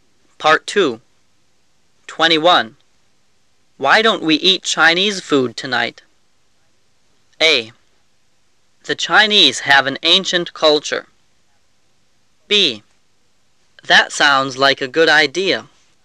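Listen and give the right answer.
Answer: B: That sounds like a good idea.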